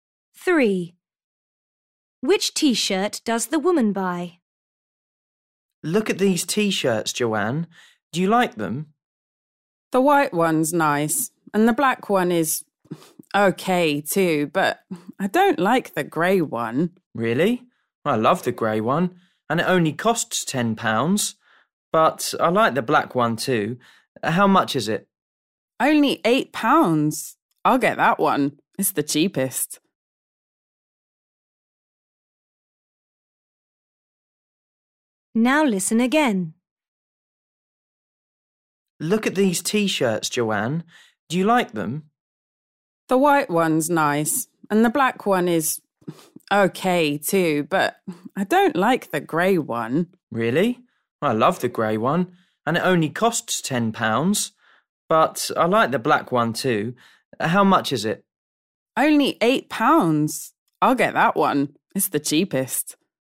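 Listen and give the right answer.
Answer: The black one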